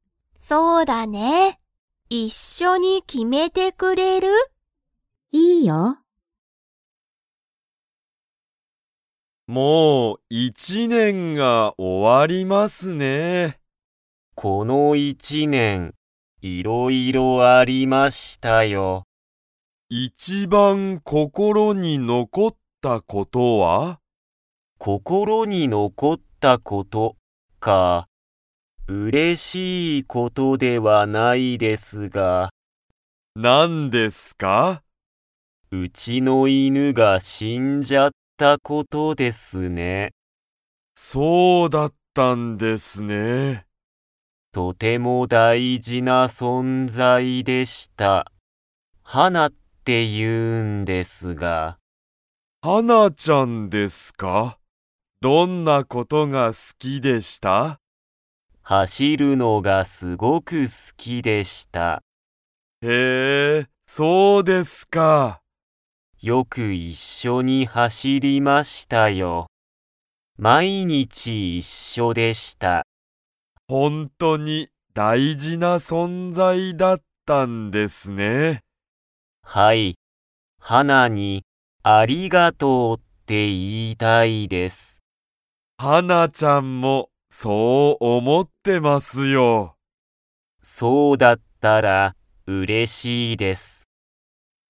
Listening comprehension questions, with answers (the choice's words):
Comprehension Quiz (Skip if you don't understand the conversation yet)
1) 長瀬(ながせ)さんの____が死(し)んだ。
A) 友達(ともだち)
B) 一年(いちねん)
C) 犬(いぬ)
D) 存在(そんざい)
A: 犬(いぬ)

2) ハナちゃんは、走(はし)ることが好(す)きでしたか?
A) はい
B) いいえ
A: はい

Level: Level 2